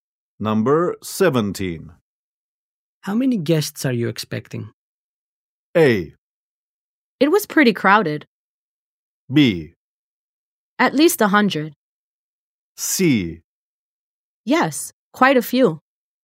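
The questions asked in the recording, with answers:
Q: How many guests are you expecting?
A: B: At least 100.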